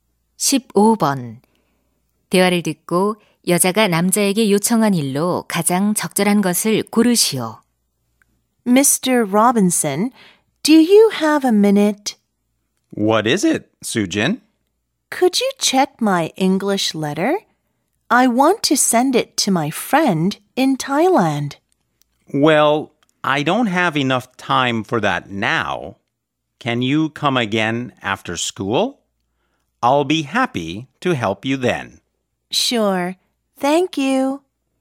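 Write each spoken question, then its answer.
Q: 대화를 듣고 여자가 남자에게 요청한 일로 가장 적절한 것을 고르시오.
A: 영어 편지 확인하기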